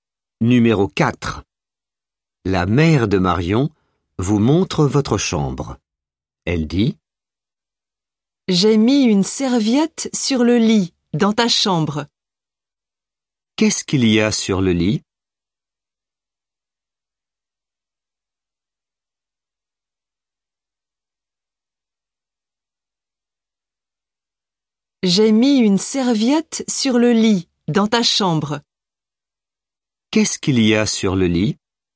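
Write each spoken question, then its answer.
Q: Qu'est-ce qu'il y a sur le lit ?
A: Une serviette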